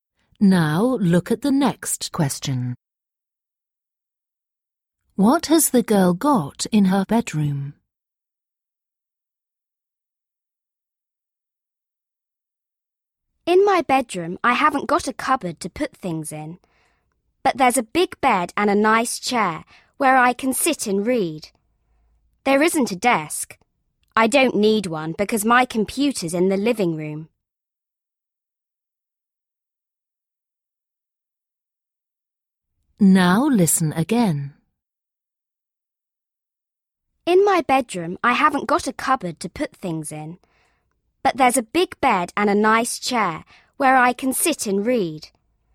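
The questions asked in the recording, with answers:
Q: What has the girl got in her bedroom?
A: a big bed and a chair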